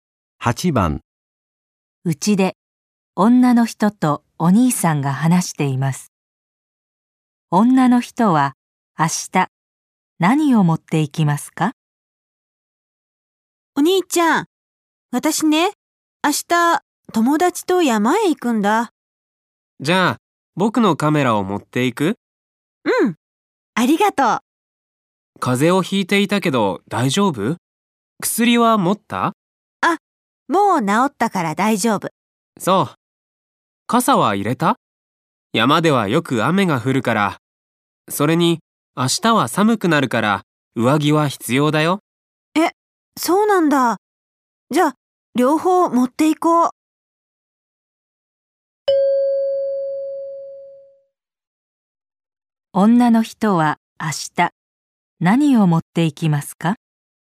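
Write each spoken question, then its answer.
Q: 女の人は明日何を持っていきますか?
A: カメラと傘と上着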